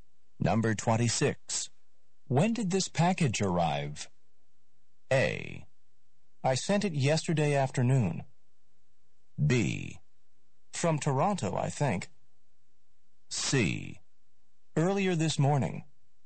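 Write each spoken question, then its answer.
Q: When did this package arrive?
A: C: Earlier this morning.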